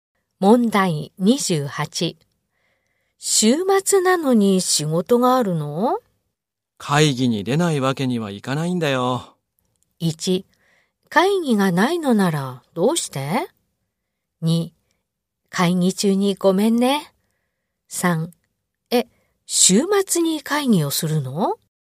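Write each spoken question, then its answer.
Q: 週末なのに仕事があるの?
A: 3: え、週末に会議をするの?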